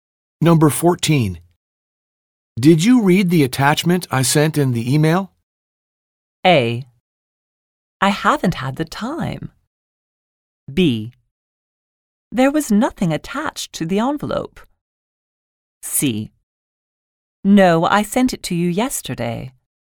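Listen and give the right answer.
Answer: A: I haven't had the time.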